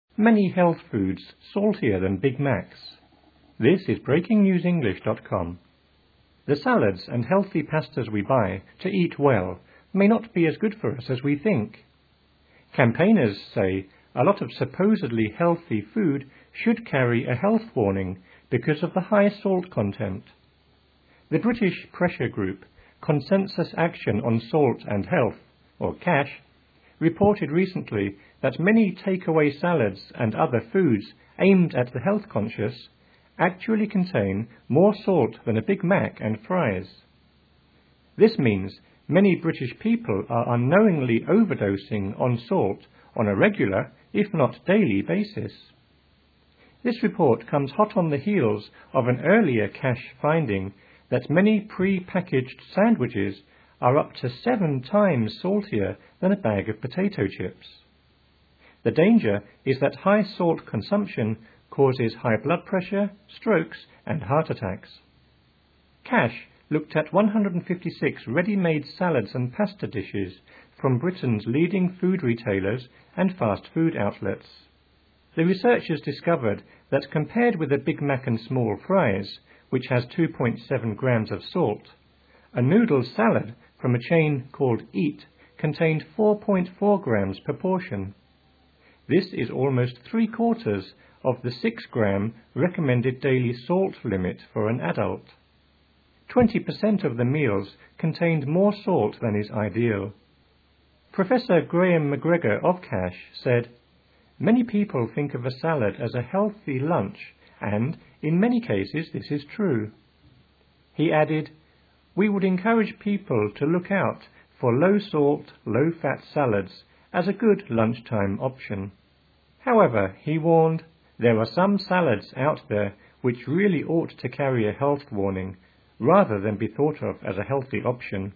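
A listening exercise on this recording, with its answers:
Listen and fill in the spaces.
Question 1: The salads and healthy pastas we buy to eat well _____________________ us as we think.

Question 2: Campaigners say a _____________________ healthy food should carry a health warning because of the high salt content.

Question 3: The British pressure group Consensus Action on Salt and Health (CASH) reported recently that many take-away salads _____________________ the health conscious actually contain more salt than a Big Mac and fries.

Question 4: This means many British people _________________________ salt on a regular, if not daily, basis.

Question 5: This report comes _____________________ an earlier CASH finding that many pre-packaged sandwiches are _____________________ than a bag of potato chips.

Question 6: CASH looked at 156 readymade salads and pasta dishes from Britain's _____________________ fast-food outlets.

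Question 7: The researchers discovered that compared with a Big Mac and small fries, _____________________ salt, a noodle salad from a chain called EAT contained 4.4 grams per portion.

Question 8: This is _____________________ the 6-gram recommended daily salt limit for an adult.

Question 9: Twenty per cent of the meals contained _____________________.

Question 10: He added: "We would encourage people _____________________, low-fat salads as a good lunchtime option."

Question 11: However, he warned: "There are some salads out there which _____________________ health warning, rather than be thought of as a healthy option."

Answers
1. may not be as good for
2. lot of supposedly
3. and other foods aimed at
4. are unknowingly overdosing on
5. hot on the heels of / up to seven times saltier
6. leading food retailers and
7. which has 2.7 grams of
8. almost three-quarters of
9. more salt than is ideal
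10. to look out for low-salt
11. really ought to carry a

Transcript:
The salads and healthy pastas we buy to eat well may not be as good for us as we think. Campaigners say a lot of supposedly healthy food should carry a health warning because of the high salt content. The British pressure group Consensus Action on Salt and Health (CASH) reported recently that many take-away salads and other foods aimed at the health conscious actually contain more salt than a Big Mac and fries. This means many British people are unknowingly overdosing on salt on a regular, if not daily, basis. This report comes hot on the heels of an earlier CASH finding that many pre-packaged sandwiches are up to seven times saltier than a bag of potato chips. The danger is that high salt consumption causes high blood pressure, strokes and heart attacks.
CASH looked at 156 readymade salads and pasta dishes from Britain's leading food retailers and fast-food outlets. 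The researchers discovered that compared with a Big Mac and small fries, which has 2.7 grams of salt, a noodle salad from a chain called EAT contained 4.4 grams per portion. This is almost three-quarters of the 6-gram recommended daily salt limit for an adult. Twenty per cent of the meals contained more salt than is ideal. Professor Graham MacGregor of CASH said: "Many people think of a salad as a healthy lunch [and] in many cases this is true." He added: "We would encourage people to look out for low-salt, low-fat salads as a good lunchtime option." However, he warned: "There are some salads out there which really ought to carry a health warning, rather than be thought of as a healthy option."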